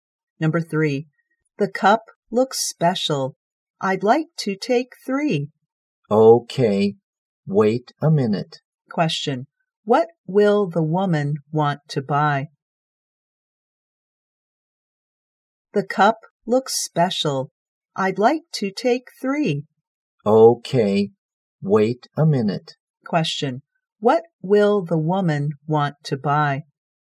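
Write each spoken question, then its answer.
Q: what will the woman want to buy?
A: Cups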